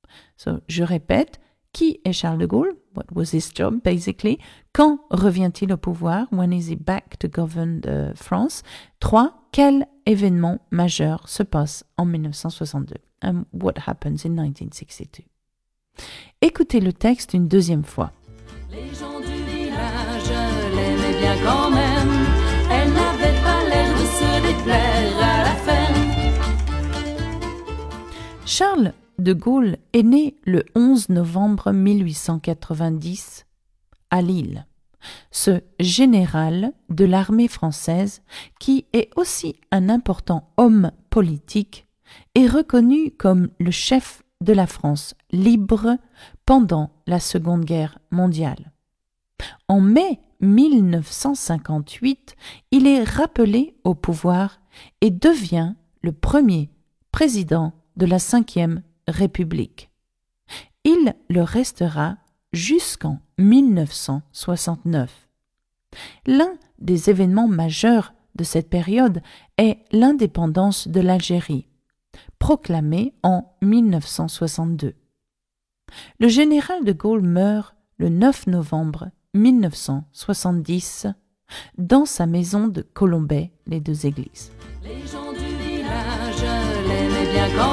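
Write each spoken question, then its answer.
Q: qui est Charles de Gaulle?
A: Un général de l'armée française et un important homme politique, chef de la France libre

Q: Quand revient-il au pouvoir?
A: En mai 1958

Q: quel événement majeur se passe en 1962?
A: L'indépendance de l'Algérie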